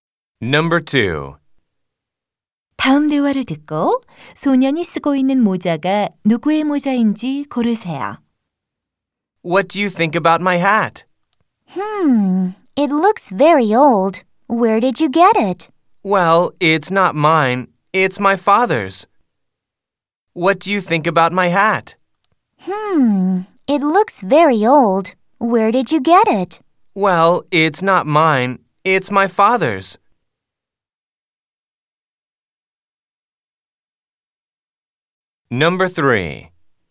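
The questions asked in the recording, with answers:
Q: 다음 대화를 듣고 소년이 쓰고 있는 모자가 누구의 모자인지 고르세요.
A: 아버지의 모자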